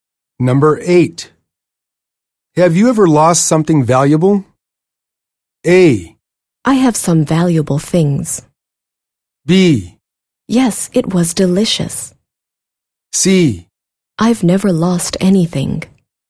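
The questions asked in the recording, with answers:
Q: Have you ever lost something valuable?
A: C: I've never lost anything.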